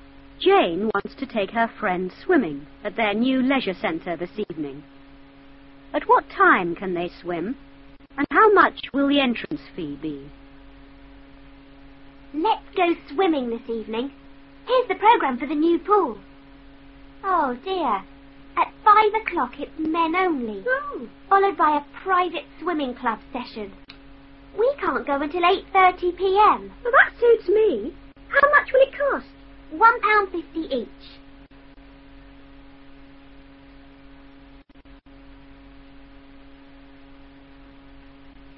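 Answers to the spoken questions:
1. 8:30 p.m.
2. £1.50 each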